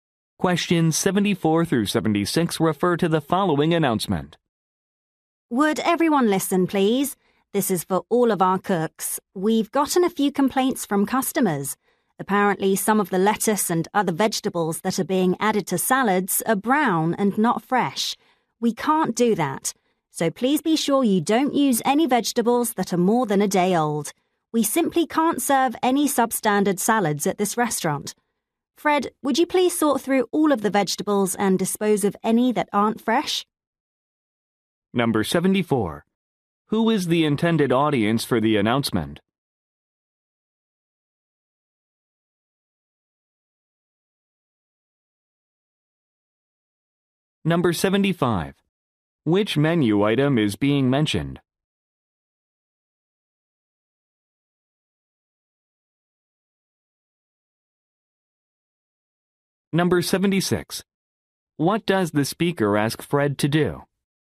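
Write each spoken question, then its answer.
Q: Who is the intended audience for the announcement?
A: Cooks

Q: Which menu item is being mentioned?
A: Salads

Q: What does the speaker ask Fred to do?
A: Sort through the vegetables and throw away any that aren't fresh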